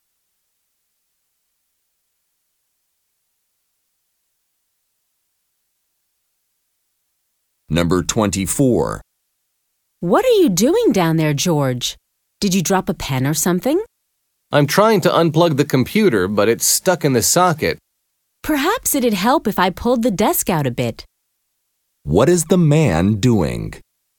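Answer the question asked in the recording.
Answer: Trying to unplug the computer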